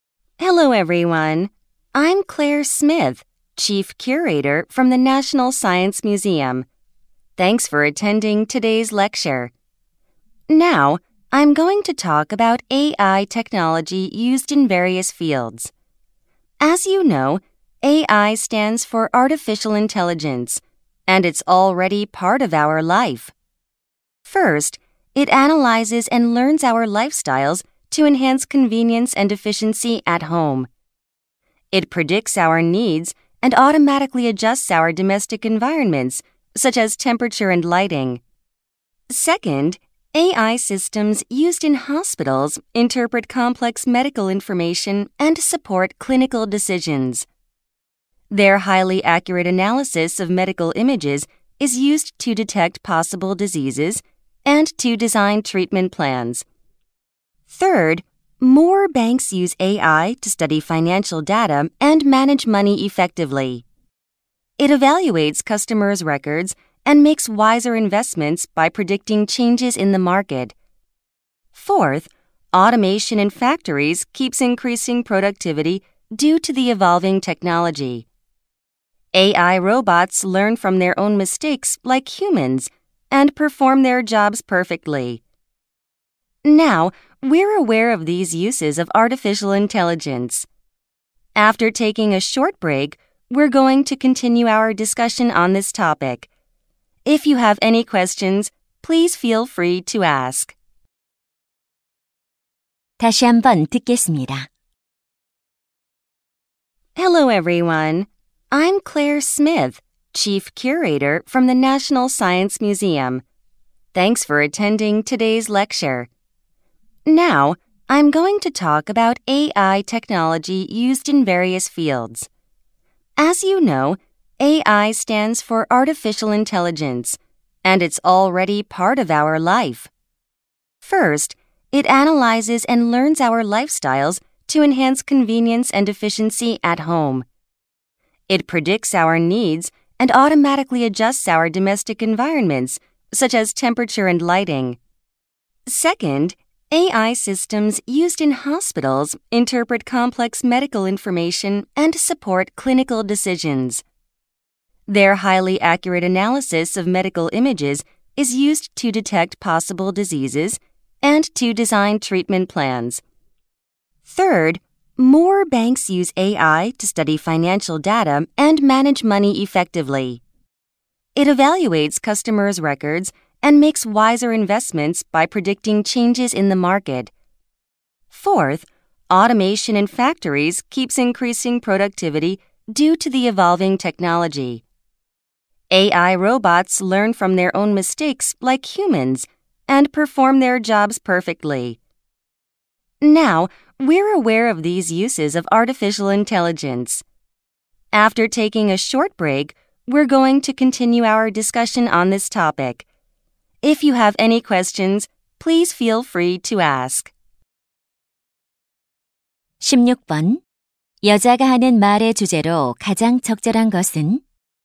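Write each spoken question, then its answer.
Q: 여자가 하는 말의 주제로 가장 적절한 것은?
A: 다양한 분야에서 쓰이는 인공지능 기술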